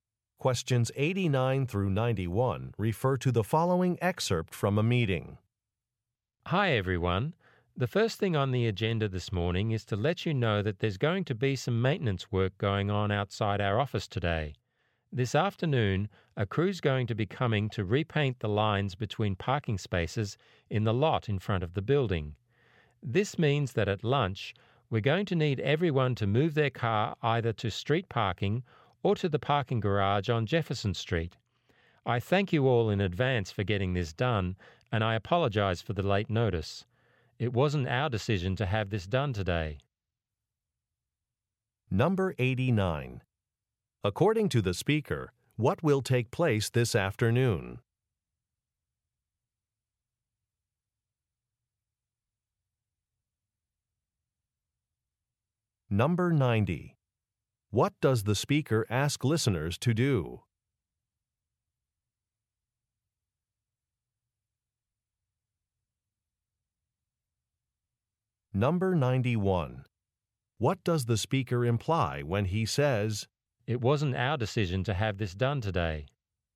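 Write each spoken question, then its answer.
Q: According to the speaker, what will take place this afternoon?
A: The lines between parking spaces in the lot will be repainted

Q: What does the speaker ask listeners to do?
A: Move their cars to street parking or the Jefferson Street garage at lunch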